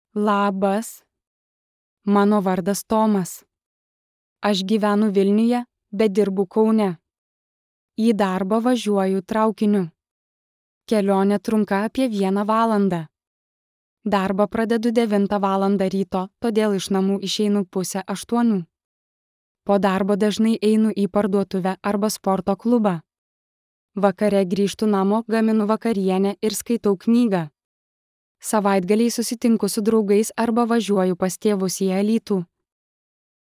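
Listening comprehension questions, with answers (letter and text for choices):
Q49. Kur Tomas gyvena?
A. Kaune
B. Vilniuje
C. Alytuje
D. Klaipėdoje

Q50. Kaip Tomas važiuoja į darbą?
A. Autobusu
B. Traukiniu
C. Automobiliu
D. Dviračiu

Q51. Ką Tomas dažnai daro po darbo?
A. Eina į parduotuvę arba sporto klubą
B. Lanko universitetą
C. Važiuoja į oro uostą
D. Dirba namuose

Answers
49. B. Vilniuje
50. B. Traukiniu
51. A. Eina į parduotuvę arba sporto klubą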